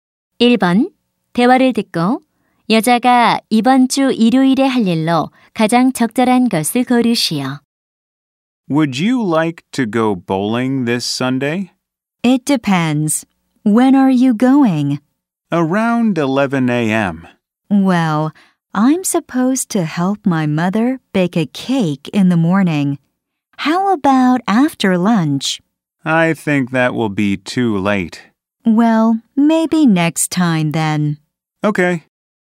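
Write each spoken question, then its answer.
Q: 대화를 듣고 여자가 이번 주 일요일에 할 일로 가장 적절한 것을 고르시오.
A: 엄마를 도와 케이크 굽기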